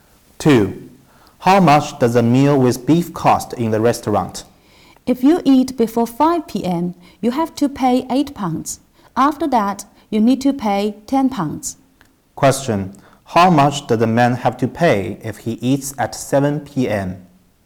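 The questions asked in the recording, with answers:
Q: How much does a man have to pay if he eats at 7 p.m.?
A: £10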